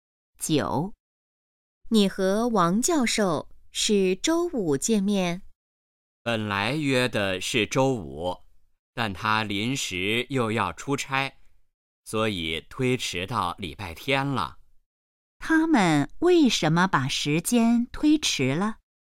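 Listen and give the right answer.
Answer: 王教授临时要出差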